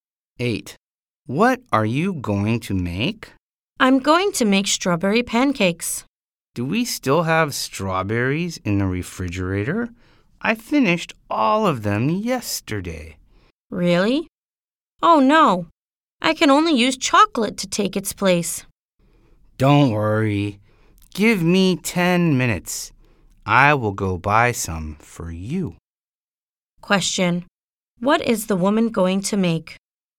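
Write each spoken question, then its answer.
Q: Question: What is the woman going to make?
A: Strawberry pancakes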